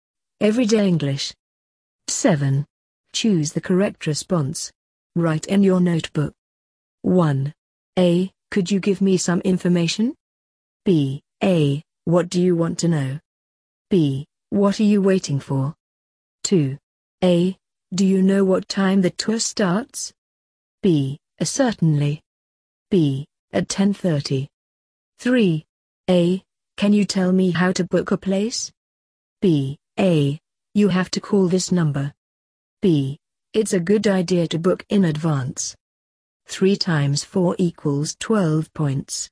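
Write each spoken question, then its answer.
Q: A. Could you give me some information?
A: A: What do you want to know?

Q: A. Do you know what time the tour starts?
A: B: At 10:30.

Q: A. Can you tell me how to book a place?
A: A: You have to call this number.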